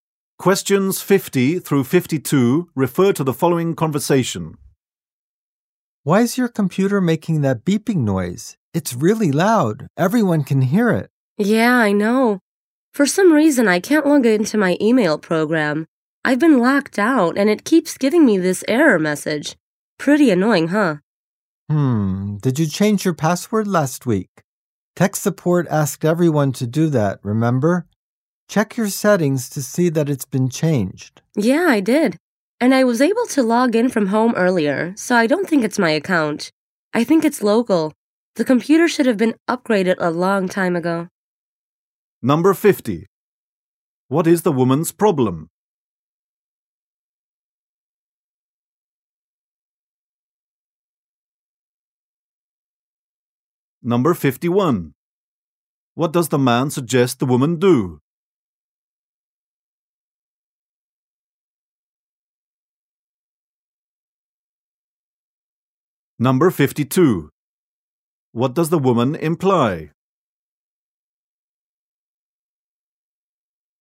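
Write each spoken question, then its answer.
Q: What is the woman's problem?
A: She can't log into her email program

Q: What does the man suggest the woman do?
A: Check her settings to see the password was changed

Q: What does the woman imply?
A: Her computer is outdated and should be upgraded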